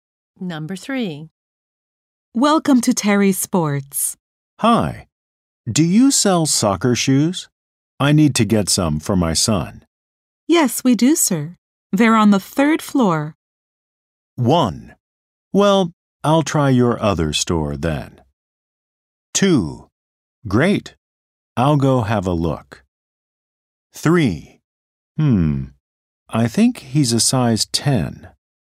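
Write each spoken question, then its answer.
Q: Yes, we do, sir. They're on the 3rd floor.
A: 2: Great. I'll go have a look.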